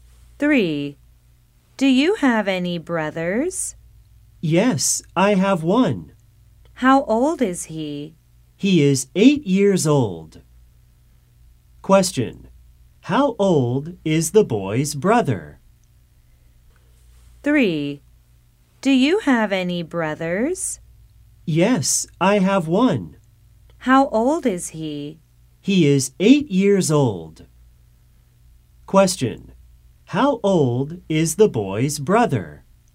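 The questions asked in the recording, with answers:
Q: How old is the boy's brother?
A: 8 years old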